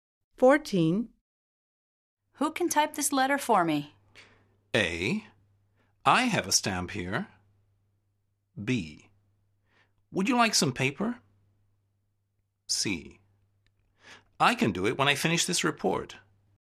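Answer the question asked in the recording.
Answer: C: I can do it when I finish this report.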